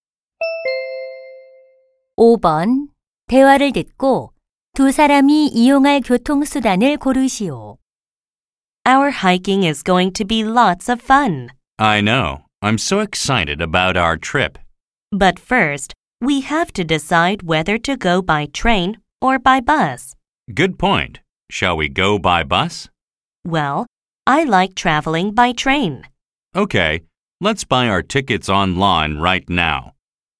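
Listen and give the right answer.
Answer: 기차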